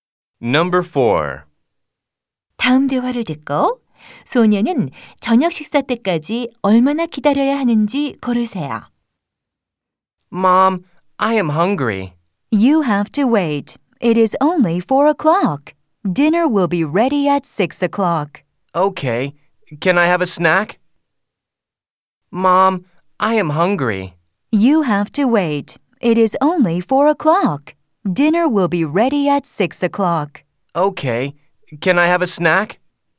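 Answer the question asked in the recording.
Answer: 2시간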